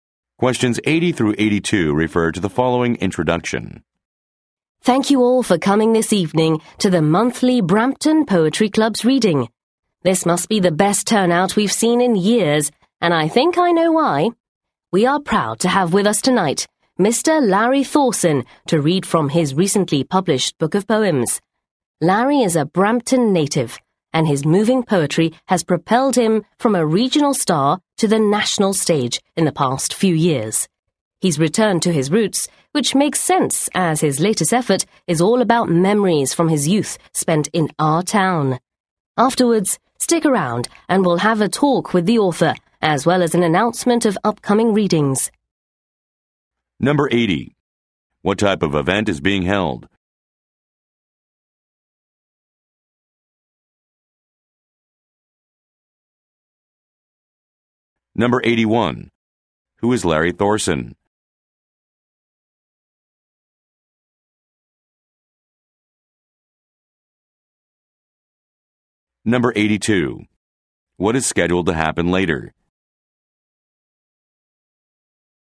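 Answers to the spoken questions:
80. A poetry reading
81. A poet from Brampton
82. A talk with the author and an announcement of upcoming readings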